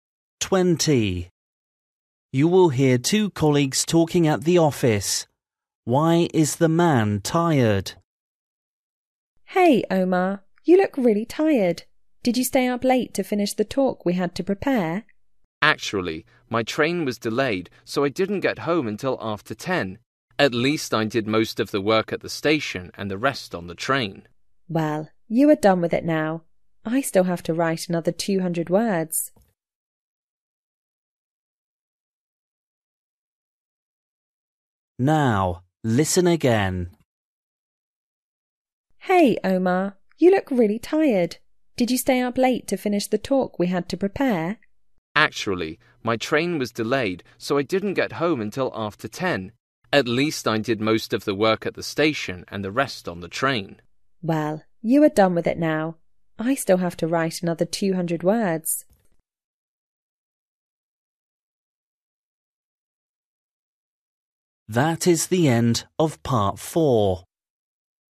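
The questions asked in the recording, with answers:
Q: Why is the man tired?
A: His train was delayed, so he got home late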